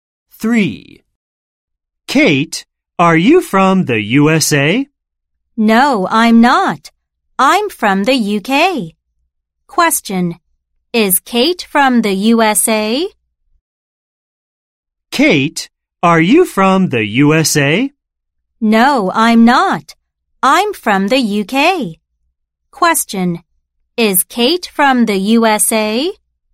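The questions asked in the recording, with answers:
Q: is Kate from the USA?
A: No, she is from the UK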